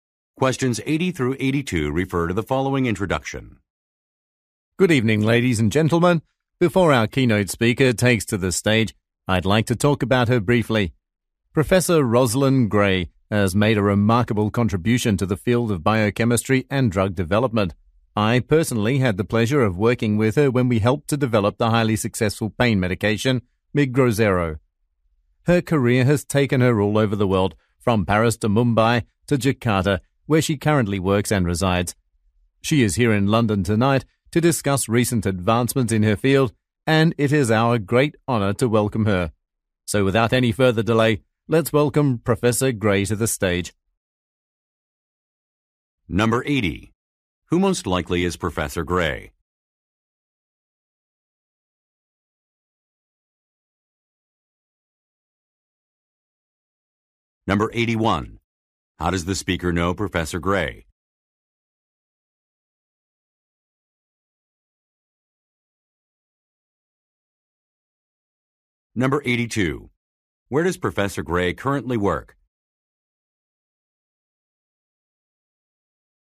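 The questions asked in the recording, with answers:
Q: Who most likely is Professor Gray?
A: A biochemist / drug development scientist

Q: How does the speaker know Professor Gray?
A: They worked together developing a pain medication

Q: Where does Professor Gray currently work?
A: Jakarta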